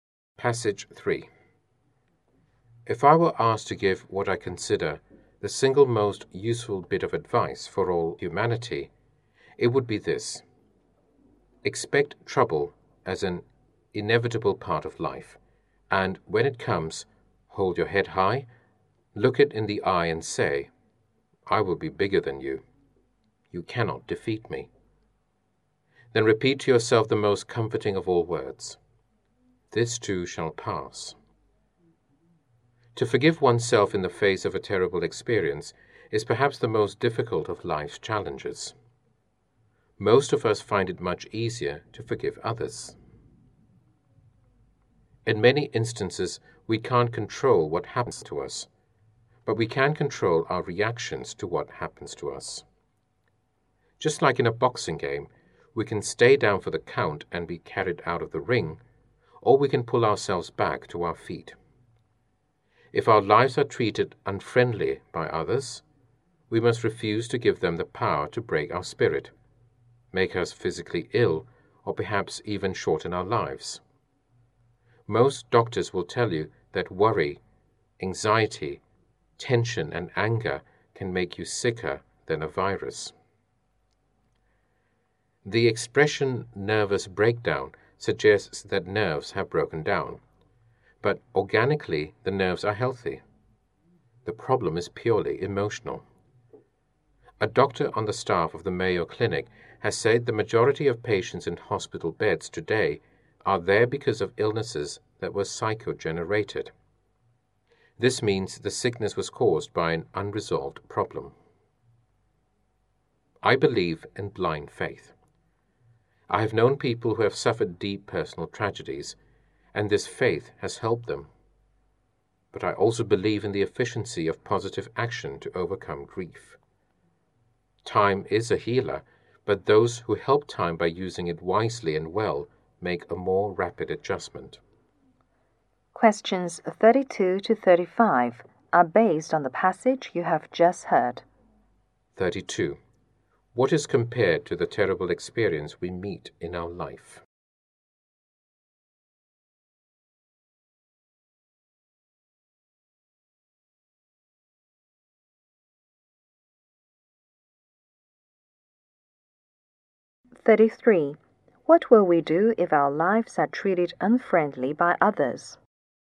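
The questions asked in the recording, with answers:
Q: What is compared to the terrible experience we meet in our life?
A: A boxing game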